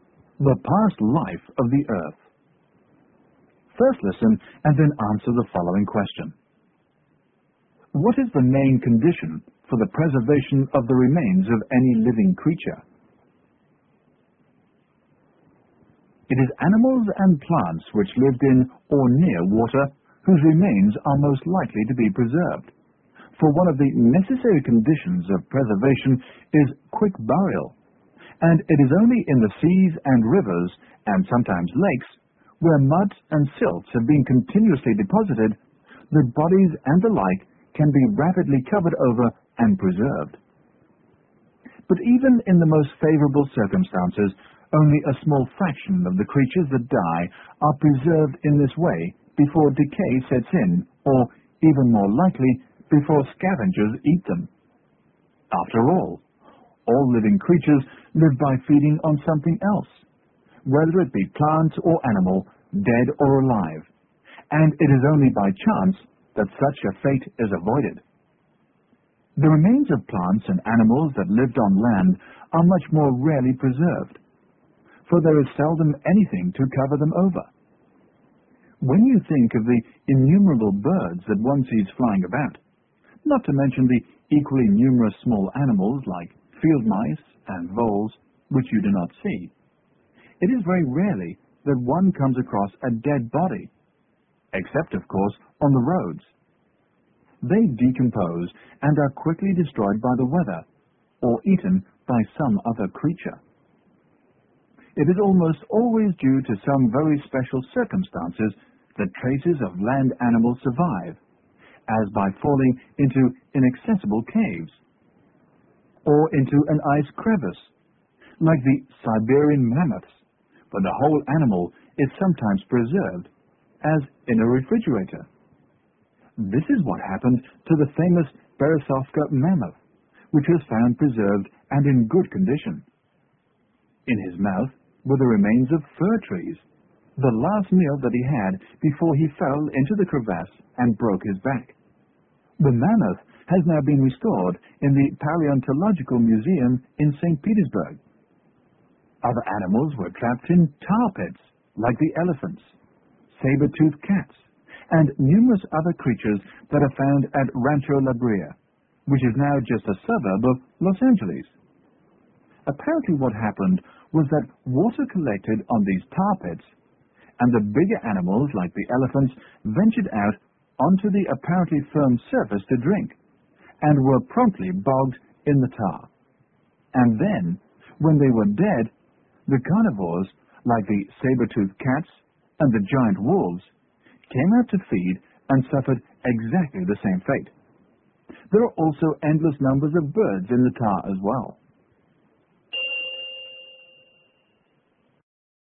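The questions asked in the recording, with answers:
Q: What is the main condition for the preservation of the remains of any living creature?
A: Quick burial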